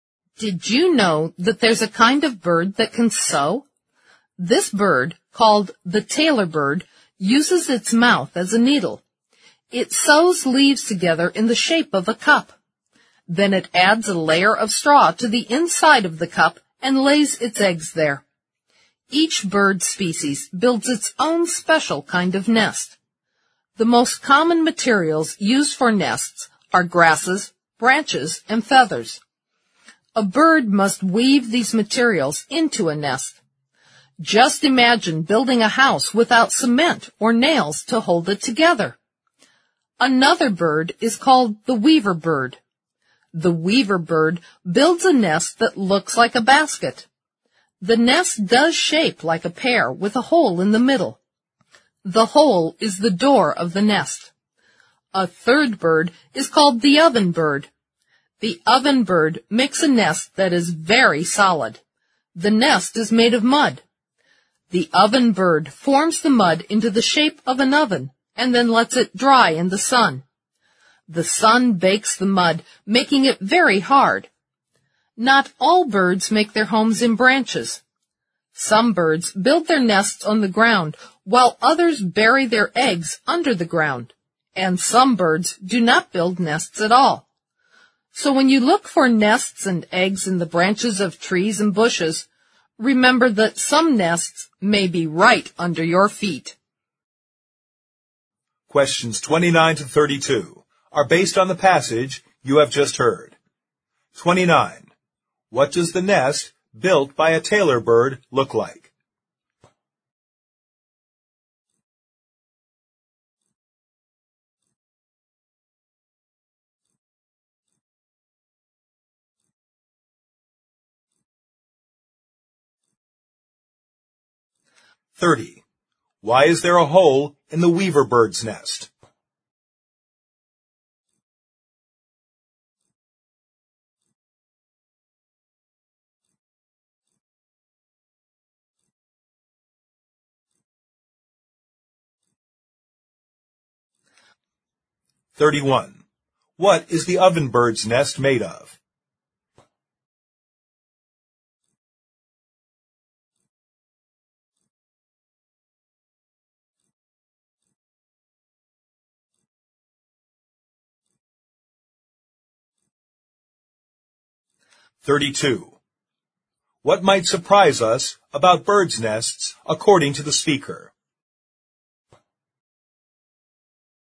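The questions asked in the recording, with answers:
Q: What does the nest built by a tailor bird look like?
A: A cup

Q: Why is there a hole in the weaver bird's nest?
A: It serves as the door of the nest

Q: What is the oven bird's nest made of?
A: Mud

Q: What might surprise us about birds' nests according to the speaker?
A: Some nests may be on or under the ground, right under our feet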